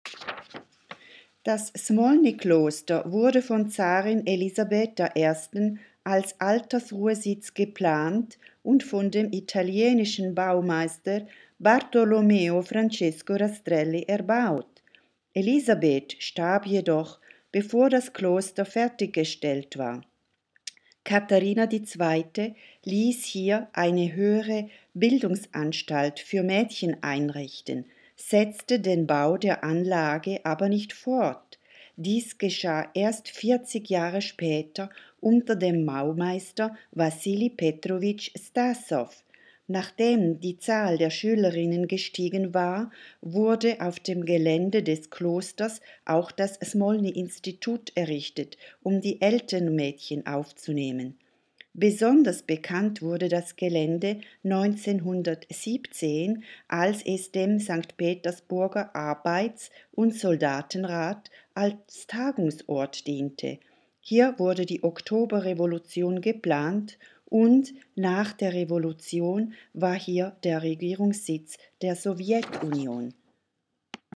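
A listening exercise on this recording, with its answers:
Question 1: In welcher Stadt steht diese Anlage?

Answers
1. St. Petersburg

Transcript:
Das SMOLNY Kloster wurde von Zarin Elisabeth I als Altersruhesitz geplant und von dem italienischen Baumeister Bartolomeo Francesco Rastrelli erbaut. Elisabeth starb jedoch, bevor das Kloster fertiggestellt war. Katharina II. ließ hier eine höhere Bildungsanstalt für Mädchen einrichten, setzte den Bau der Anlage aber nicht fort. Dies geschah erst 70Jahre später unter dem Baumeister Wassili Petrowitsch Stassow.
Nachdem die Zahl der Schülerinnen gestiegen war, wurde auf dem Gelände des Klosters auch das Smolny-Institut errichtet, um die älteren Mädchen aufzunehmen. Besonders bekannt wurde das Gelände 1917, als es dem Arbeiter- und Soldatenrat als Tagungsort diente. Hier wurde die Oktoberrevolution geplant, und nach der Revolution war hier der Regierungssitz der Sowjetunion.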